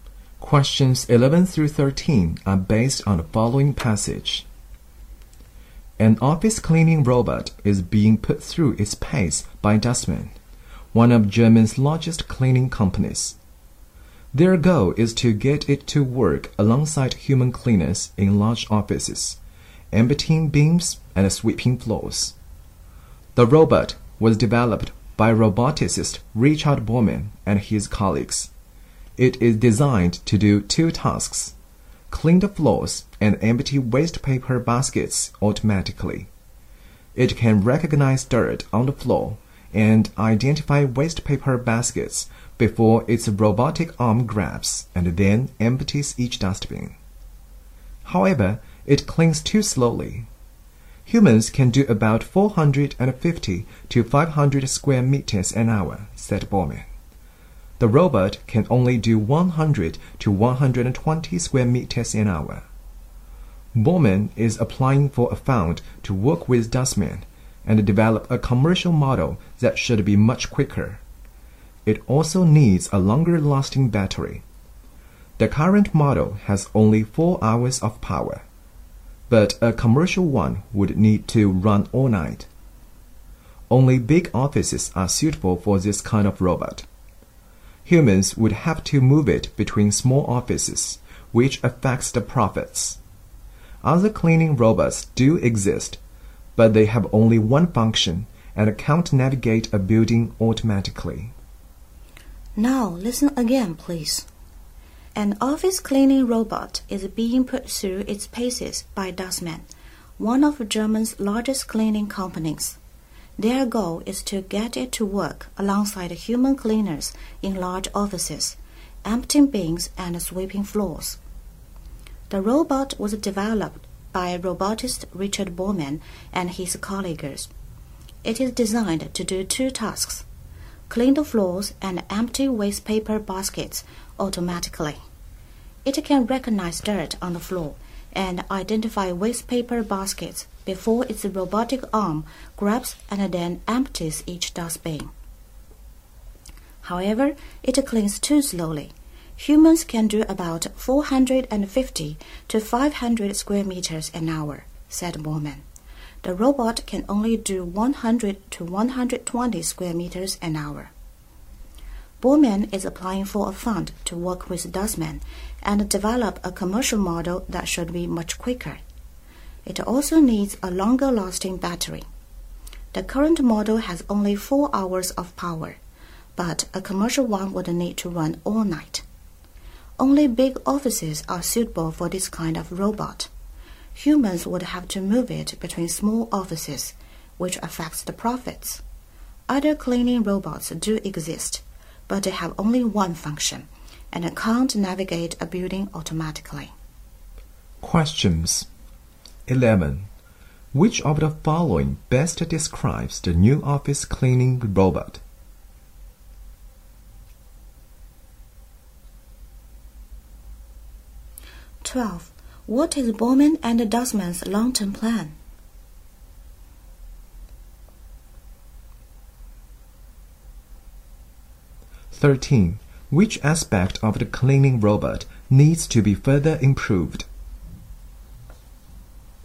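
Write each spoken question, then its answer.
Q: What is Bormann and Dustman's long-term plan?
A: To develop a quicker commercial model

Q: Which aspect of the cleaning robot needs to be further improved?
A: Its speed and battery life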